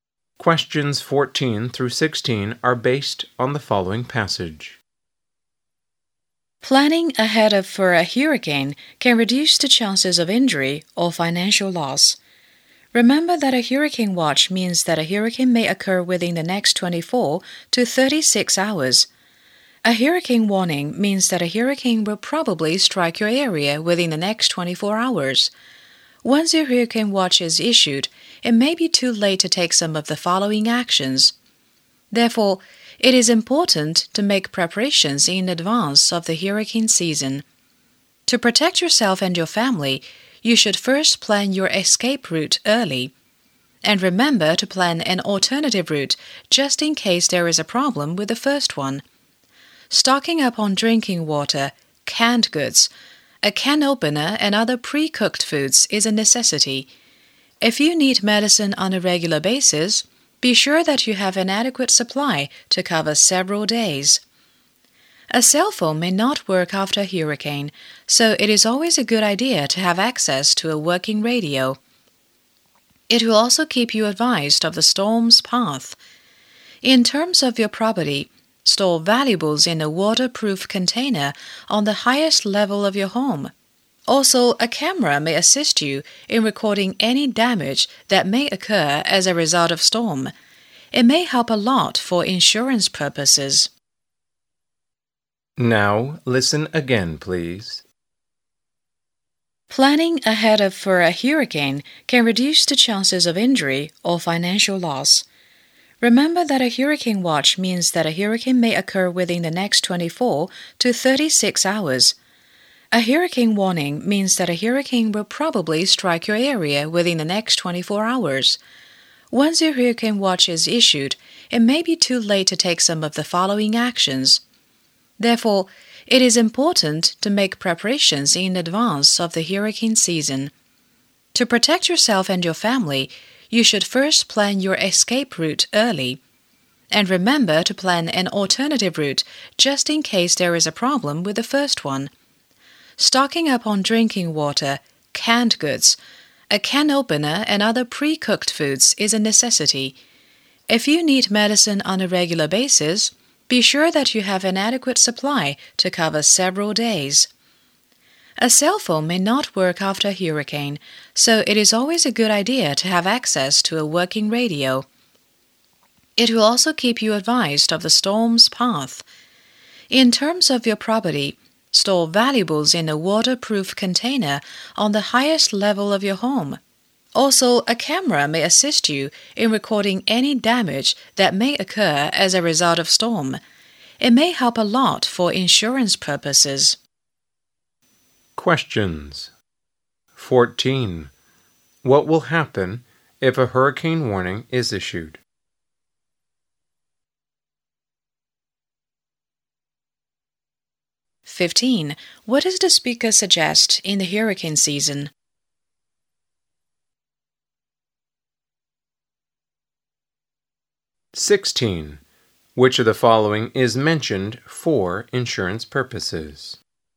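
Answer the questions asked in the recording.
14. A hurricane will probably strike within 24 hours
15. Make preparations in advance
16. A camera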